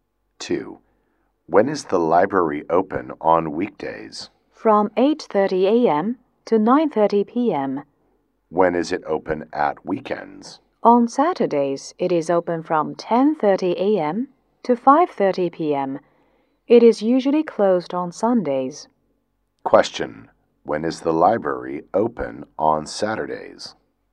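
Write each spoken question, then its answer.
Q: when is the library open on Saturdays?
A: From 10:30 a.m. to 5:30 p.m.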